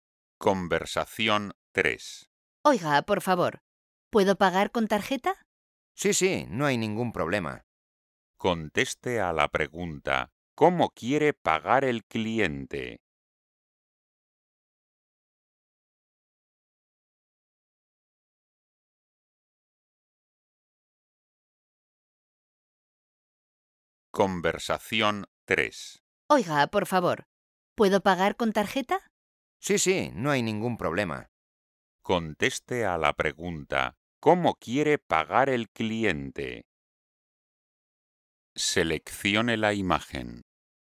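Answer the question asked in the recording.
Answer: con tarjeta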